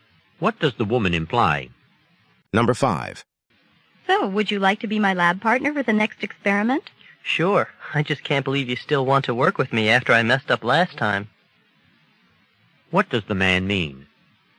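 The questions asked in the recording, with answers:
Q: What does the man mean?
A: He is surprised she still wants him as her partner after his mistake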